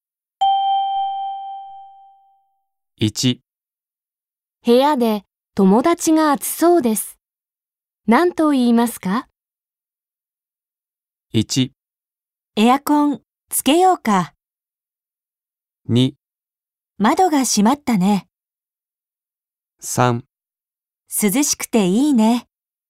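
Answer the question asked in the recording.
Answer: 1: エアコンつけようか。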